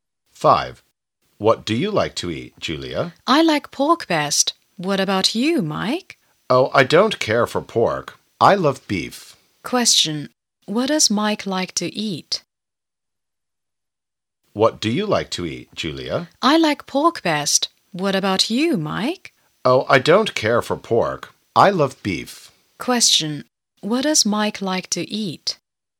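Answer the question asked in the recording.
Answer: Beef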